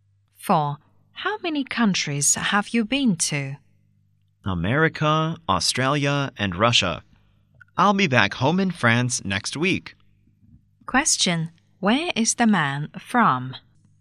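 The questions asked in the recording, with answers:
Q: Where is the man from?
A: France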